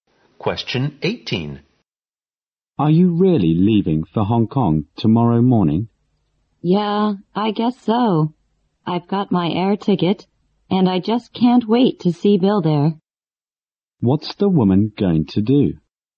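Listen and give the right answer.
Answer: Fly to Hong Kong to see Bill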